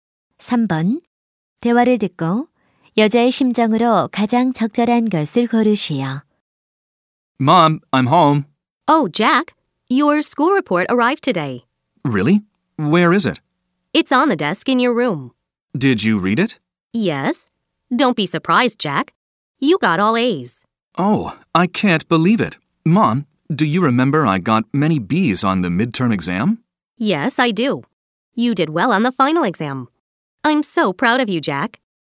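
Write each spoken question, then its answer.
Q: 대화를 듣고 여자의 심정으로 가장 적절한 것을 고르시오.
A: 자랑스러움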